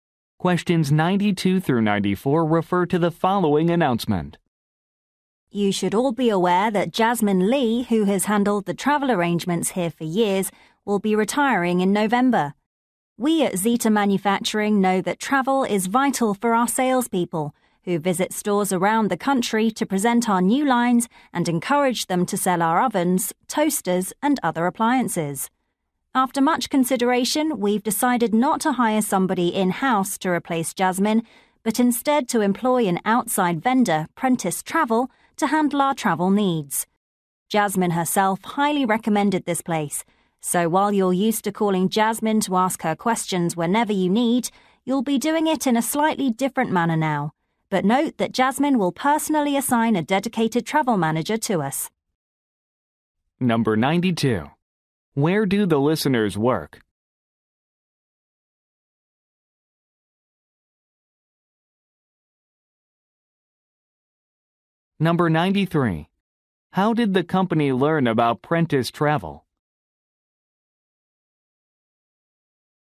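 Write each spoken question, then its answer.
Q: Where do the listeners work?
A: At an appliance manufacturer

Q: How did the company learn about Prentice Travel?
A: Jasmine recommended it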